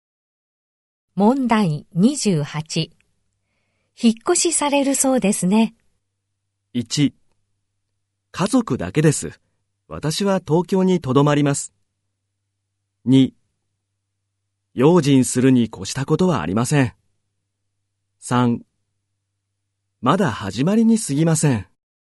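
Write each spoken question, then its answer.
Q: 引っ越しされるそうですね。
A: 1: 家族だけです。私は東京にとどまります。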